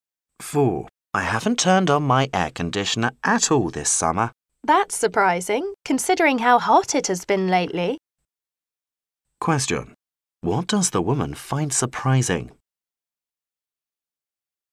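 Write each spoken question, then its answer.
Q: What does the woman find surprising?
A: The man hasn't used his air conditioner this hot summer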